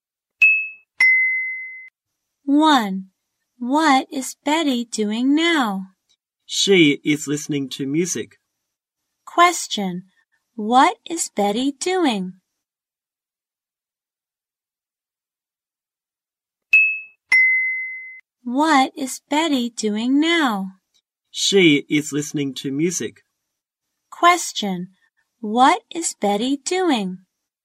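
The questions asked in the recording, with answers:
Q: What is Betty doing?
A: She is listening to music.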